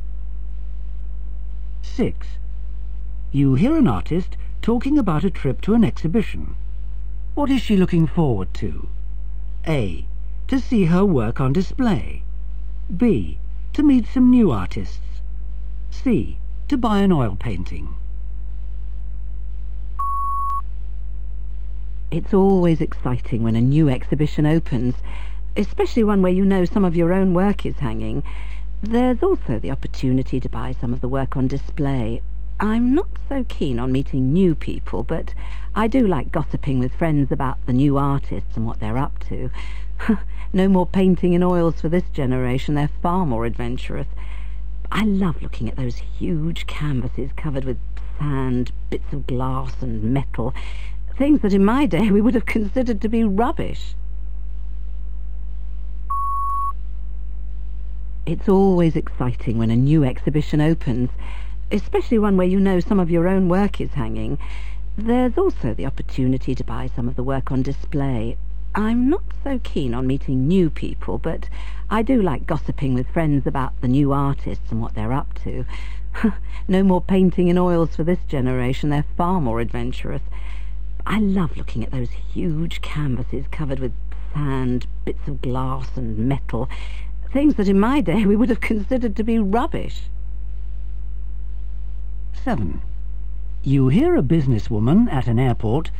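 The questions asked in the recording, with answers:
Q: What is she looking forward to?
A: A: To see her work on display.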